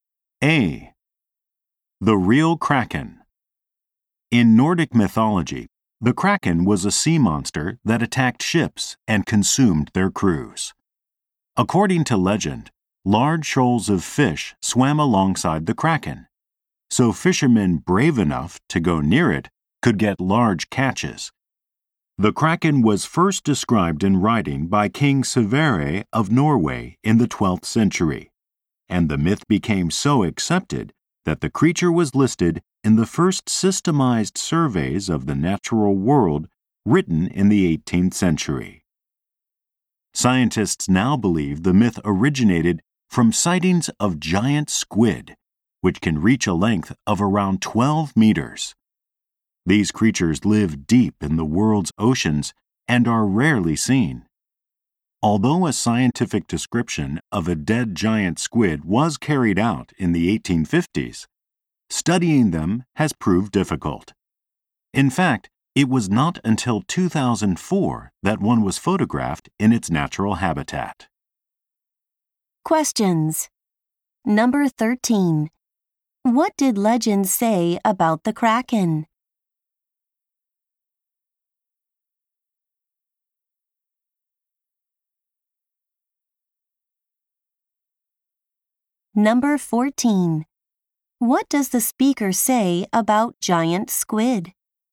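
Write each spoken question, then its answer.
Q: What did legend say about the Kraken?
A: Fishermen near it could catch many fish

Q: What does the speaker say about giant squid?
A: They are rarely seen and were only photographed in their natural habitat in 2004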